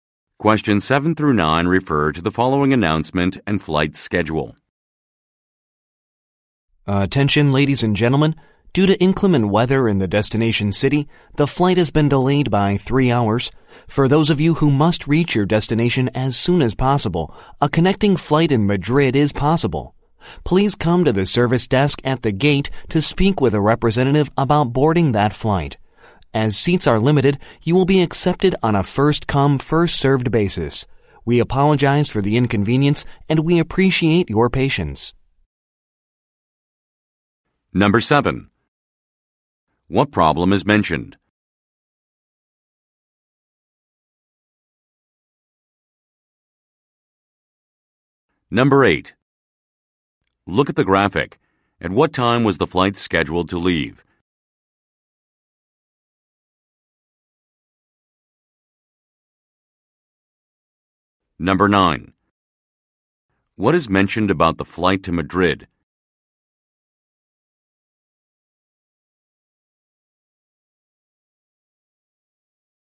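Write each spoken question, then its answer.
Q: What problem is mentioned?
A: The flight is delayed 3 hours due to bad weather at the destination

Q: What is mentioned about the flight to Madrid?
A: Seats are limited, first-come, first-served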